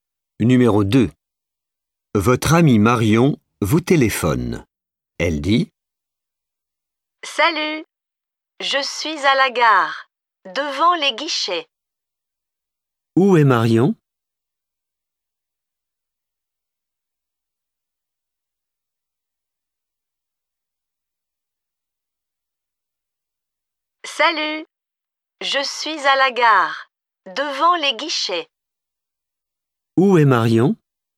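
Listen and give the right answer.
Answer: À la gare, devant les guichets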